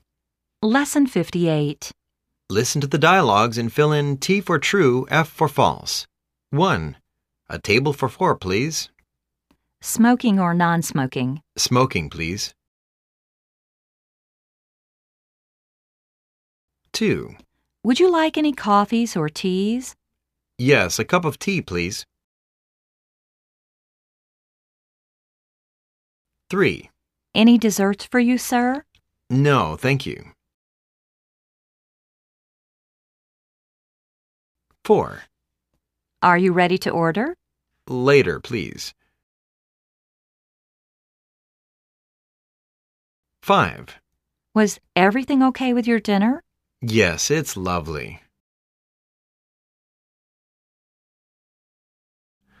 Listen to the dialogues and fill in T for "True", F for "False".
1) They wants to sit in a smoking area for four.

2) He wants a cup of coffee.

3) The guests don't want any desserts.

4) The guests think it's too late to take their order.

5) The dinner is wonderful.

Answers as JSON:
{"1": "T", "2": "F", "3": "T", "4": "F", "5": "T"}